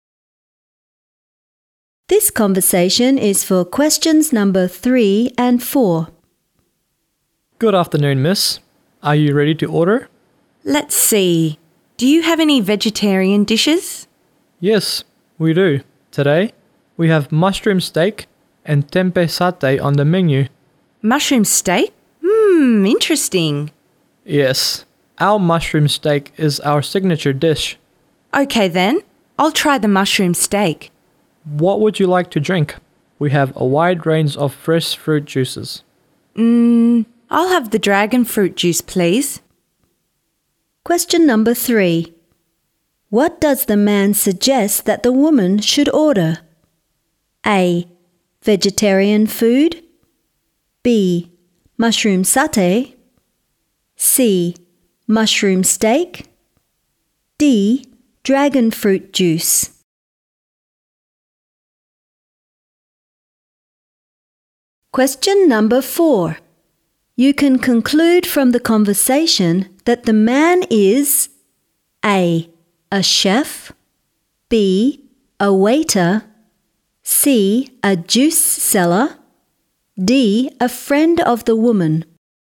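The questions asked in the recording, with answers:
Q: What does the man suggest that the woman should order?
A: C: Mushroom steak.

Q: You can conclude from the conversation that the man is A.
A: B: A waiter.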